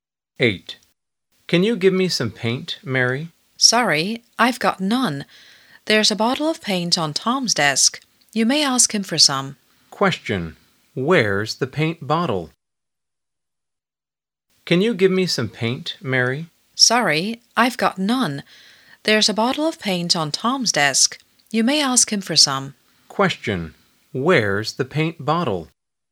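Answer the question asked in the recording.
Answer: On Tom's desk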